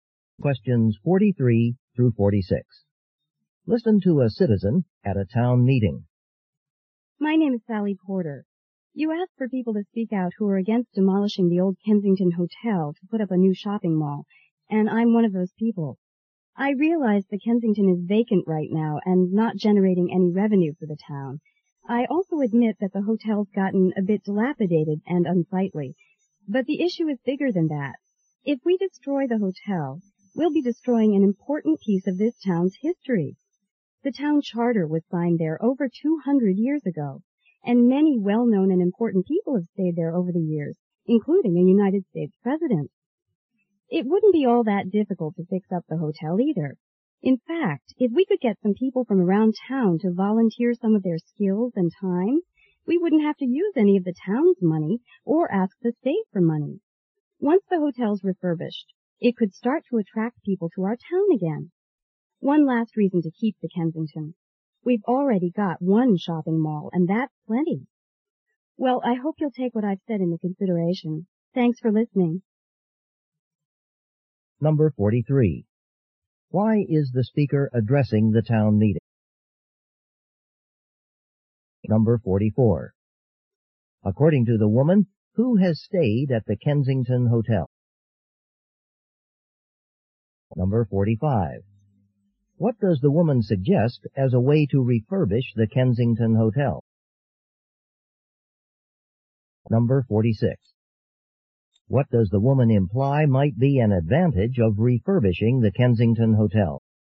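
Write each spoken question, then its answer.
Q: Why is the speaker addressing the town meeting?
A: To oppose demolishing the Kensington Hotel

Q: According to the woman, who has stayed at the Kensington Hotel?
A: A United States president

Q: What does the woman suggest as a way to refurbish the Kensington Hotel?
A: Use volunteers from the town

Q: What does the woman imply might be an advantage of refurbishing the Kensington Hotel?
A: It could attract people to the town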